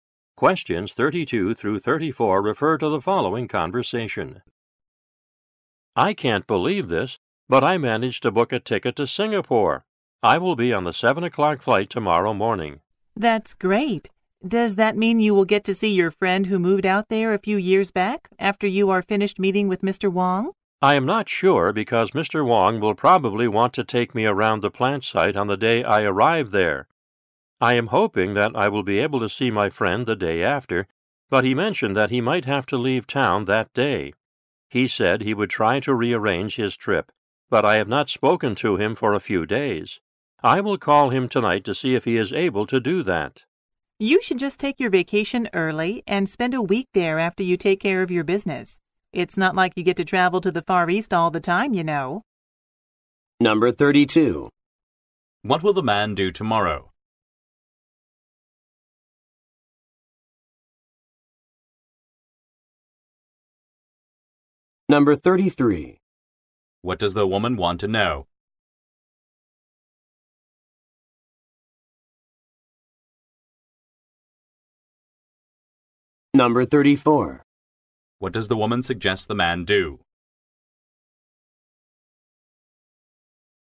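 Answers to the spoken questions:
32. Fly to Singapore on the 7 o'clock flight
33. Whether he will get to see his friend in Singapore
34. Take his vacation early and spend a week there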